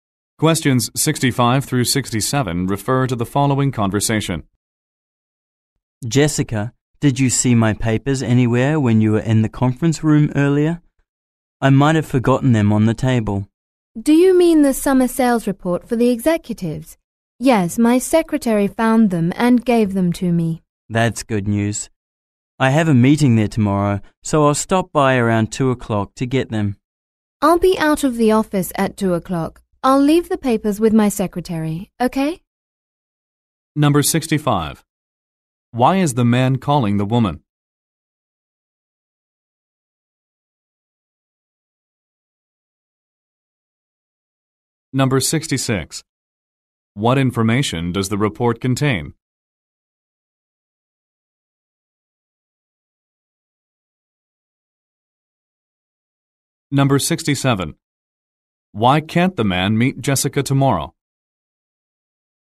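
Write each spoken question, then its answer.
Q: What information does the report contain?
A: Summer sales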